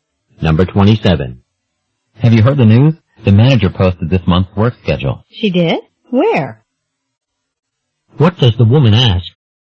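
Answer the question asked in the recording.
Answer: Where the work schedule was posted.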